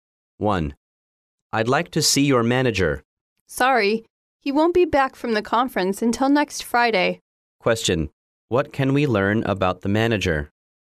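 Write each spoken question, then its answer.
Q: What can we learn about the manager?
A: He is at a conference and won't be back until next Friday.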